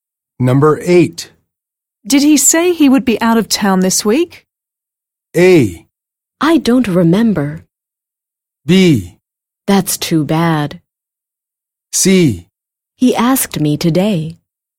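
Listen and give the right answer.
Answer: A: I don't remember.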